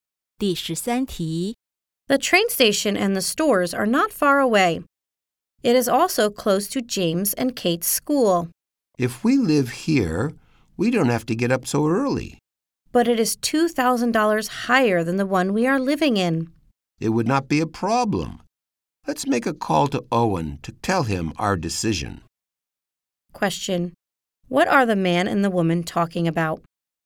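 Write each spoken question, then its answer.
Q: What are the man and the woman talking about?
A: Moving to a new home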